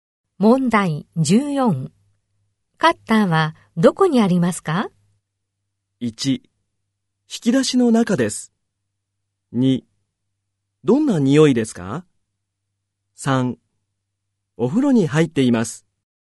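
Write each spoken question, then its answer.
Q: カッターはどこにありますか?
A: 1: 引き出しの中です。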